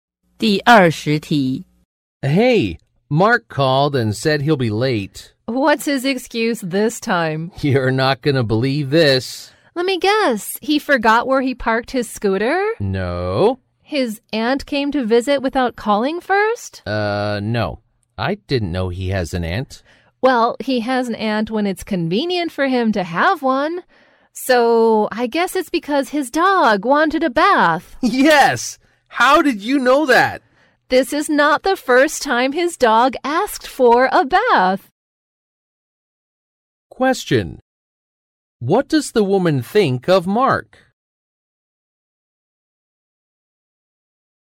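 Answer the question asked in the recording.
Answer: He often makes up excuses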